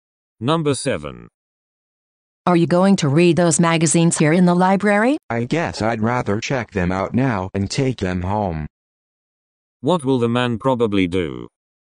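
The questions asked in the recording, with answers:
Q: What will the man probably do?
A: Check out the magazines and take them home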